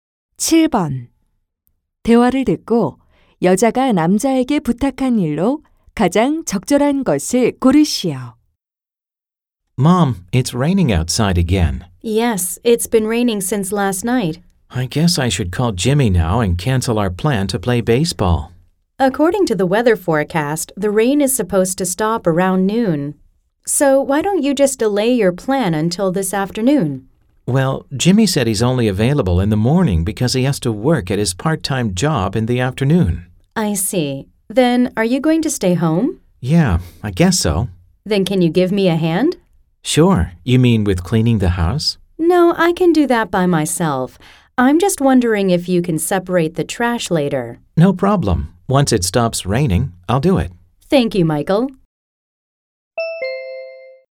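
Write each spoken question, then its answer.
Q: 대화를 듣고 여자가 남자에게 부탁한 일로 가장 적절한 것을 고르시오.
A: 쓰레기 분리수거하기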